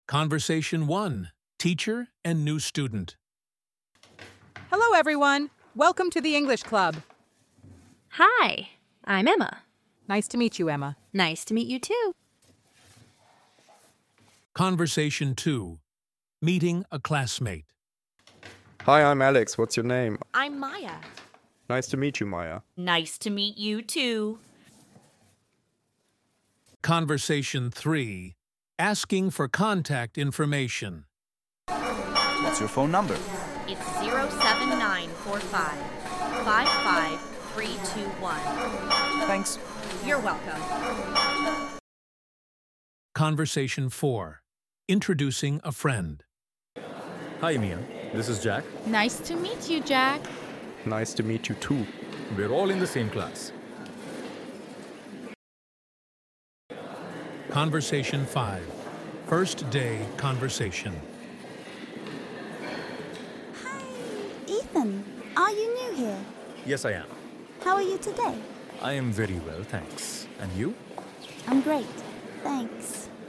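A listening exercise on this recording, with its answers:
Listen to the conversation and complete the missing words.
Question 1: Teacher: Nice to you, Alex.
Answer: meet

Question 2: Student: Nice to meet you, .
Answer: too

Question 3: Alex: Hi, I'm Alex. What's your ?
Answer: name

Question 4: Tom: What's your phone ?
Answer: number

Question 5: Tom: .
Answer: Thanks

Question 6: Ben: Hi, Maya. is Jack.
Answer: This

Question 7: Maya: Nice to you, Jack.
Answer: meet

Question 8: Jack: Nice to meet you, .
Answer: too

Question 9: Ethan: Yes, I .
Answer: am

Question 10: Lily: How are today?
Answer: you

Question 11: Ethan: I'm very well, . And you?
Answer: thanks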